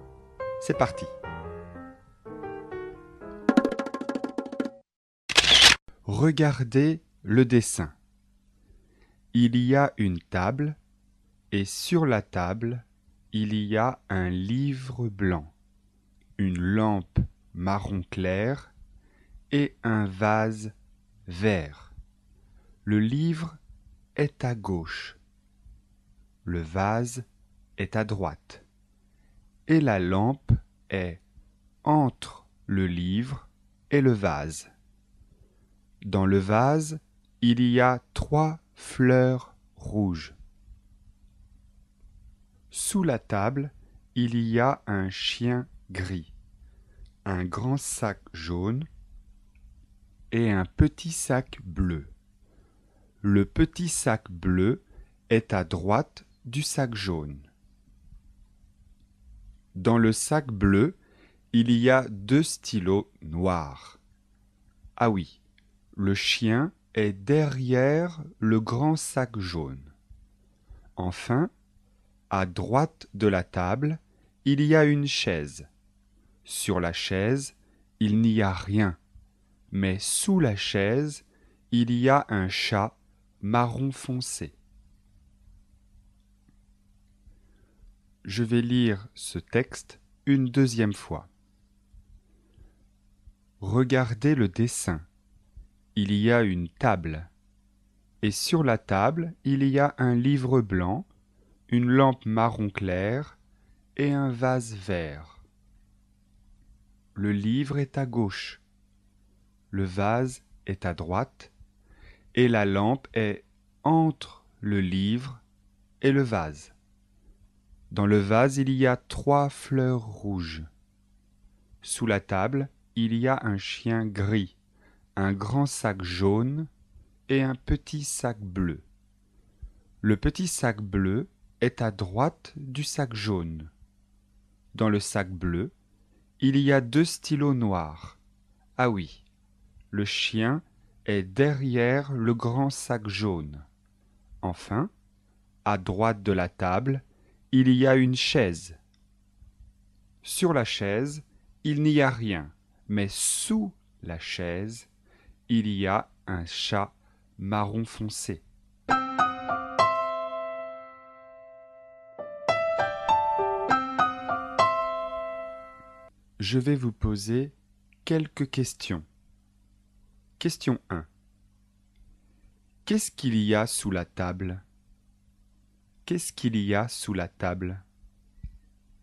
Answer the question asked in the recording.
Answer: Il y a deux sacs et un chien.